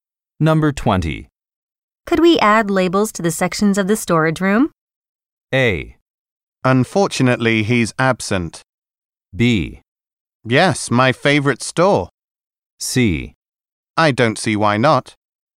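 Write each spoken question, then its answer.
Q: Could we add labels to the sections of the storage room?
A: C: I don't see why not.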